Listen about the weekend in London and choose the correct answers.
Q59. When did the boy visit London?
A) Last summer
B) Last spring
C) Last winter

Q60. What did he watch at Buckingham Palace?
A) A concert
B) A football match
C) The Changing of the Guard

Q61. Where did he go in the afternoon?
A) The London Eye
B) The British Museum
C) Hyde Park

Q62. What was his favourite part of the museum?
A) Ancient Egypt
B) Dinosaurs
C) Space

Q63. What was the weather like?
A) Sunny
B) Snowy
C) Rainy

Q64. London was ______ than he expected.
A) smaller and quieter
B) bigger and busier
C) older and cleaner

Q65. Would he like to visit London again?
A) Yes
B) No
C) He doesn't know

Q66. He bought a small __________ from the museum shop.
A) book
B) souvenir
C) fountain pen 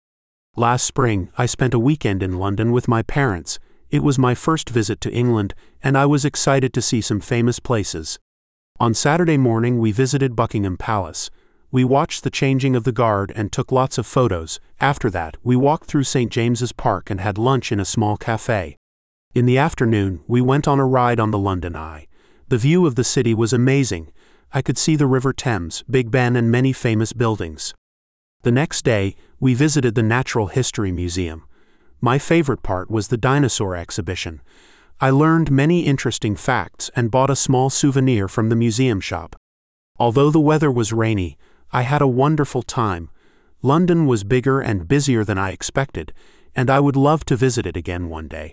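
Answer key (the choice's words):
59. Last spring
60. The Changing of the Guard
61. The London Eye
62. Dinosaurs
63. Rainy
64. bigger and busier
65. Yes
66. souvenir

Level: CERTIFICATE LEVEL A2 TEST (JUNIOR)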